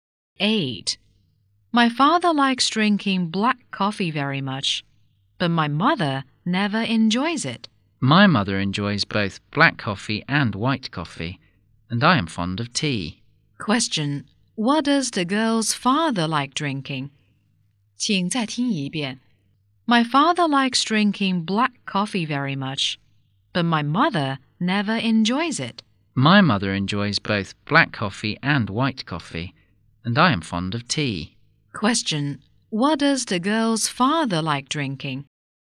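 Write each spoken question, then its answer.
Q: What does the girl's father like drinking?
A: Black coffee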